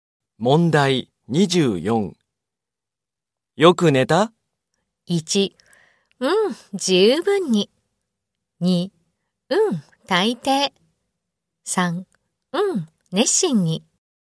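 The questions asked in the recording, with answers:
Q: よく寝た?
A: 1: うん、十分に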